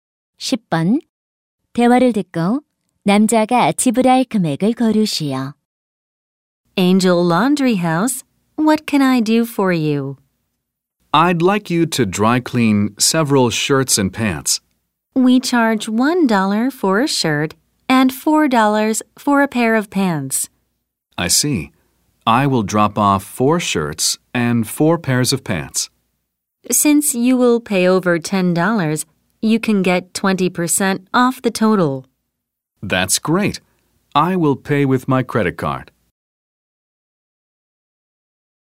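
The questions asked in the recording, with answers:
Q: 대화를 듣고 남자가 지불할 금액을 고르시오.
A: 16달러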